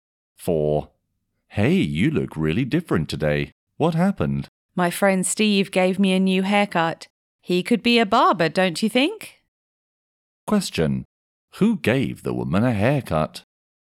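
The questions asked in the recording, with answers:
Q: Who gave the woman a haircut?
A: Her friend Steve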